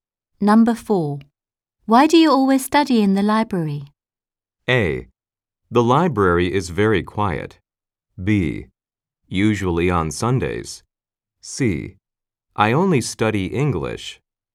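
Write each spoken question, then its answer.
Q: Why do you always study in the library?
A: A: The library is very quiet.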